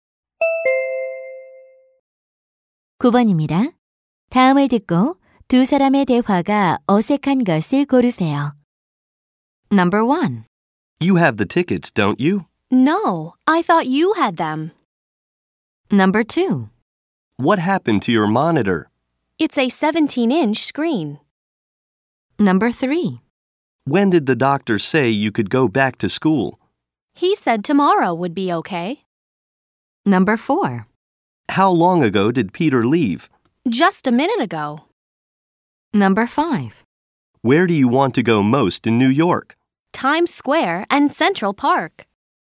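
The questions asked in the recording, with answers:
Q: 다음을 듣고 두 사람의 대화가 어색한 것을 고르세요.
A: 2번: What happened to your monitor? It's a 17-inch screen.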